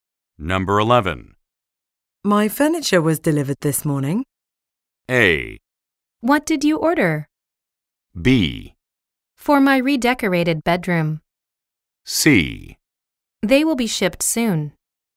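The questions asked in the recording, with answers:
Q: My furniture was delivered this morning.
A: A: What did you order?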